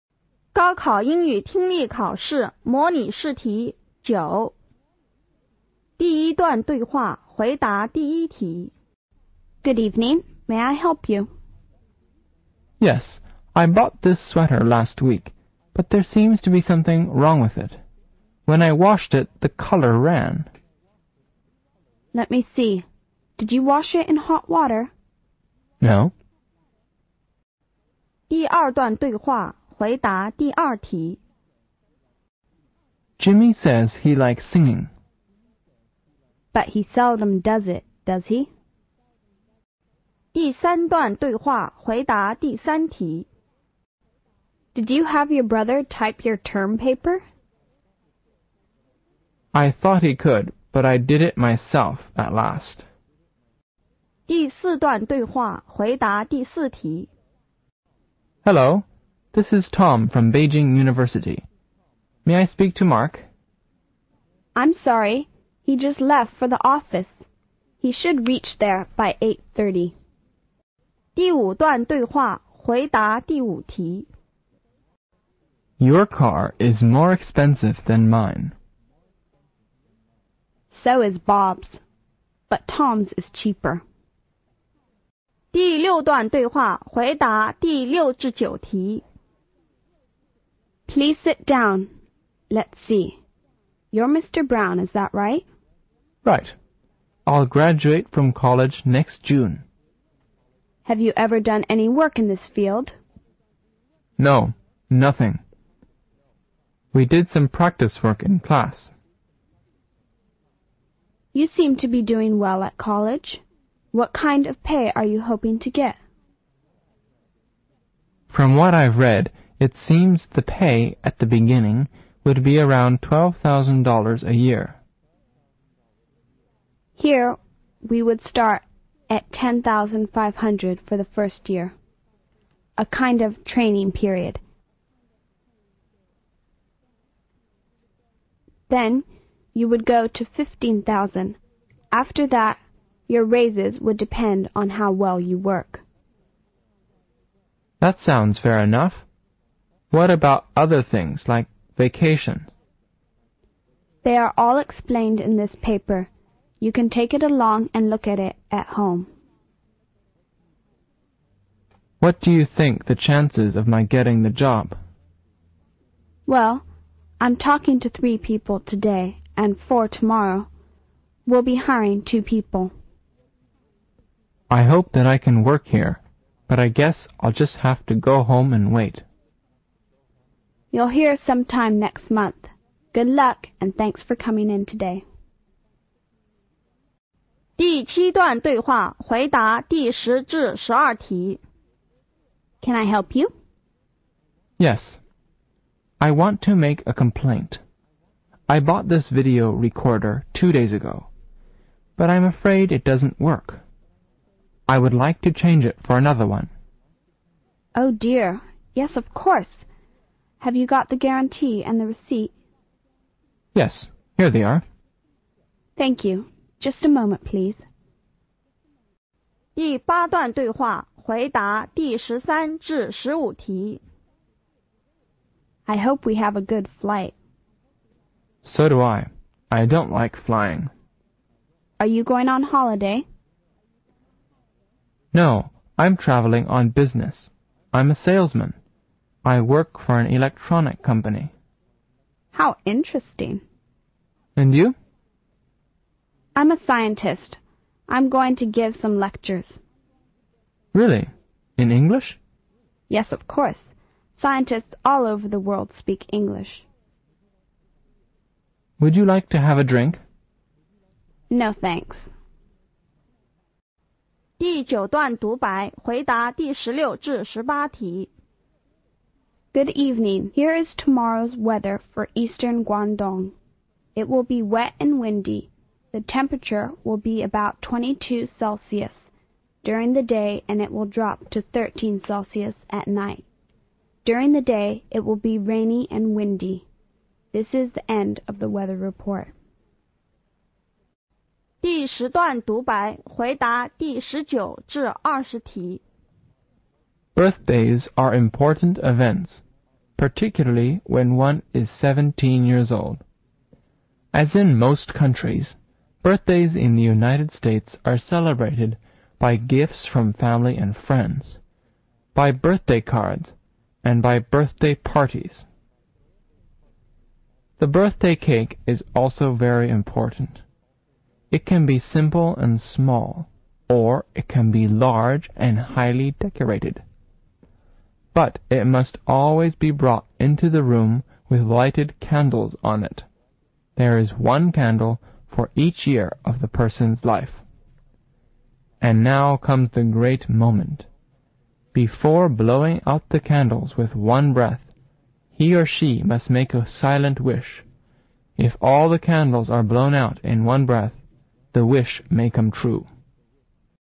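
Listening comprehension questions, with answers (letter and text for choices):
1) What is the relationship between the two speakers?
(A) Shop assistant and customer.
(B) Shop assistant and her manager.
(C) Police officer and teacher.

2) What does the woman think about Jimmy?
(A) He enjoys watching people performing.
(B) He might not really like singing.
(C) He doesn't think singing is hard.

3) Who typed the paper.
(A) The woman.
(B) Their friend.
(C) The man.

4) Where's Mark now?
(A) At the office.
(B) On his way to the office.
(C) On his way to Guangzhou University.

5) Whose car is the cheapest?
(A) Bob's.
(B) Tom's.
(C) The man's.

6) What salary does the company pay the first year?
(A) $15000.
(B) $13500.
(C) $10500.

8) How many people are asking for the job?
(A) Two.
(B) Four.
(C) Seven.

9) Which of the following is not true?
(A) The man has no experience in the job he is asking for.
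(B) The man is good at his lessons at college.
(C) The man will know if he gets the job next June.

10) Where did the dialogue most probably take place?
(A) In a store.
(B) In a hotel.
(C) On a restaurant.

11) Why did the man come here?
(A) To buy a vedio recorder.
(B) To repair his vedio recorder.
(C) To change his vedio recorder.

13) What is the most probable relation between the two speakers?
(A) They are friends.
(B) They are strangers.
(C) They ate both scientists.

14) Where did the dialogue take place?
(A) One a bus.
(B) On a train.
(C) On a place.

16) Which area is the weather forecast for?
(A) Eastern Guangdong.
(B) Western Guangdong.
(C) Southern Guangdong.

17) What will be the lowest temperature of the day?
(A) 22.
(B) 14.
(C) 13.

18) What will the day be like?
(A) Wet and Windy.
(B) Hot and Windy.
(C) Wet and Warm.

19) What must she or he do before blowing out the candles with one breath?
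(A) Sing a song.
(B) Make a silent wish.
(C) Tell an interesting story.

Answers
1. (A) Shop assistant and customer.
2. (B) He might not really like singing.
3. (C) The man.
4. (B) On his way to the office.
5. (B) Tom's.
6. (C) $10500.
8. (C) Seven.
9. (C) The man will know if he gets the job next June.
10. (A) In a store.
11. (C) To change his vedio recorder.
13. (B) They are strangers.
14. (C) On a place.
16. (A) Eastern Guangdong.
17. (C) 13.
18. (A) Wet and Windy.
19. (B) Make a silent wish.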